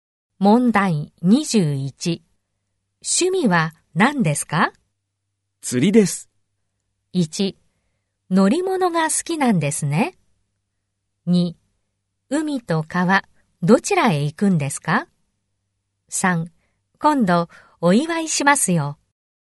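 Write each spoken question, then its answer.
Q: 趣味は何ですか?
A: 2: 海と川、どちらへ行くんですか?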